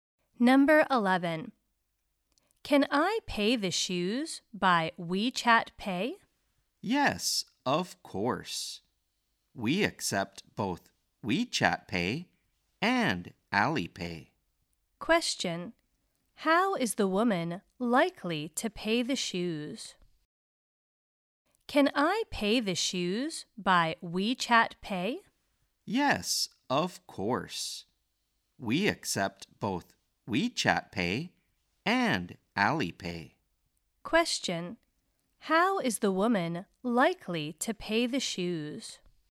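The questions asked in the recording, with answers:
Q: how is the woman likely to pay the shoes?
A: By WeChat Pay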